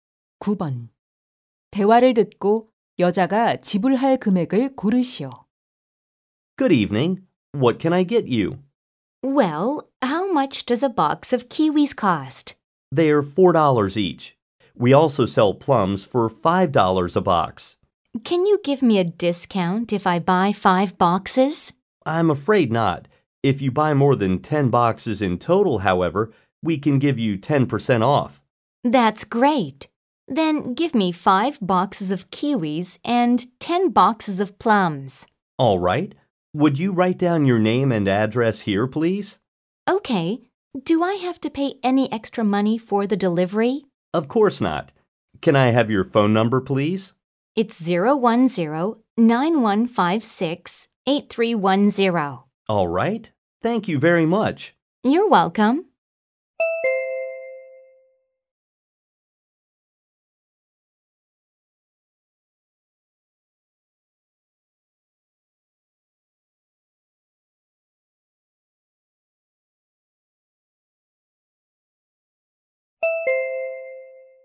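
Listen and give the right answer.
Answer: $63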